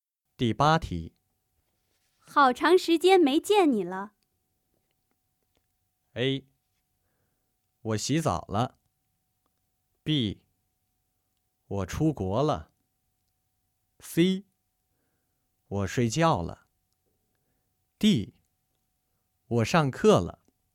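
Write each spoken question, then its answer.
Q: 好长时间没见你了。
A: B: 我出国了。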